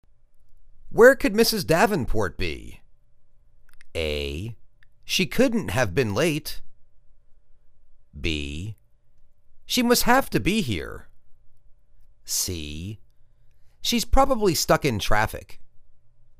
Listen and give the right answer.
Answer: She's probably stuck in traffic.